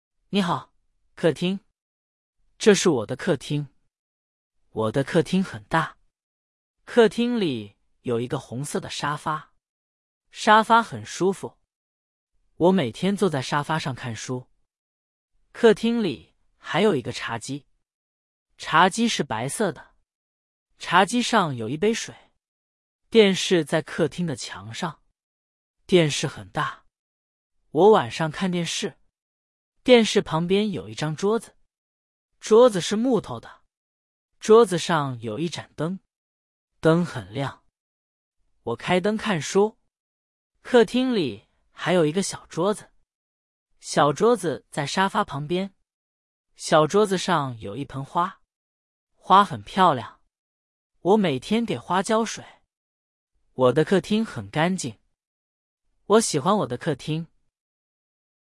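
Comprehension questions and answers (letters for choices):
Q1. 客厅里有什么?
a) 沙发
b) 床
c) 冰箱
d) 洗衣机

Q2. 沙发是什么颜色的?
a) 白色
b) 红色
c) 蓝色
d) 绿色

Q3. 茶几上有什么?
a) 一本书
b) 一杯水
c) 一盏灯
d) 一盆花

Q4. 作者每天给什么浇水?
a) 沙发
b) 电视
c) 花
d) 桌子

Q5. 客厅很小。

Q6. 沙发是红色的。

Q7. 茶几是黑色的。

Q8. 电视在客厅的墙上。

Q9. 桌子上有一盏灯。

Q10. 作者不喜欢他的客厅。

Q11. 客厅里有什么颜色的沙发?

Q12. 小桌子上有什么?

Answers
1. a
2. b
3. b
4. c
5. 错
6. 对
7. 错
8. 对
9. 对
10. 错
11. 红色
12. 一盆花

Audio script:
你好, 客厅
这是我的客厅。我的客厅很大。客厅里有一个红色的沙发。沙发很舒服。我每天坐在沙发上看书。客厅里还有一个茶几。茶几是白色的。茶几上有一杯水。
电视在客厅的墙上。电视很大。我晚上看电视。电视旁边有一张桌子。桌子是木头的。桌子上有一盏灯。灯很亮。我开灯看书。
客厅里还有一个小桌子。小桌子在沙发旁边。小桌子上有一盆花。花很漂亮。我每天给花浇水。我的客厅很干净。我喜欢我的客厅。

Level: Beginner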